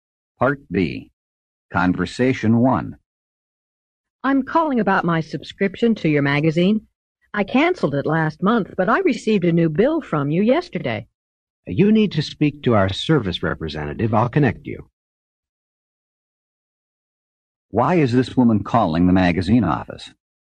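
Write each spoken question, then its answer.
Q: Why is this woman calling the magazine office?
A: She got a bill after canceling her subscription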